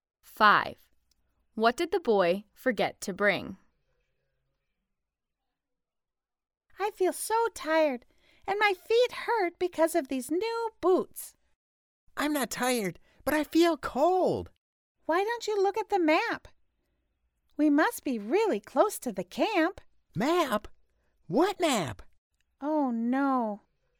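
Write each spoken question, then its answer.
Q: What did the boy forget to bring?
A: The map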